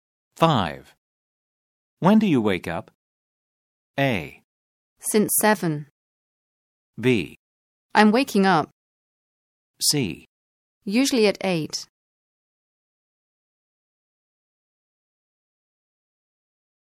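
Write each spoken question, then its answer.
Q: When do you wake up?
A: C: Usually at 8.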